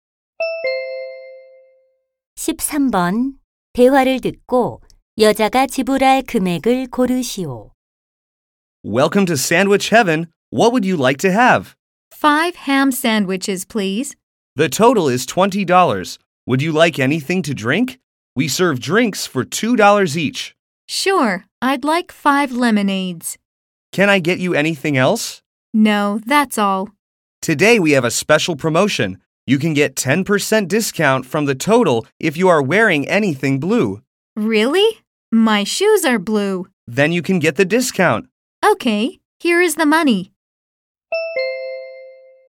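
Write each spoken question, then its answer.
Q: 대화를 듣고 여자가 지불할 금액을 고르시오.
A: 27달러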